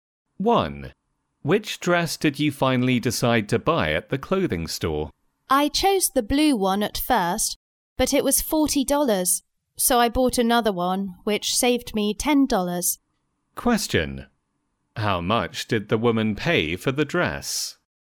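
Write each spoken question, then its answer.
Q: How much did the woman pay for the dress?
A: $30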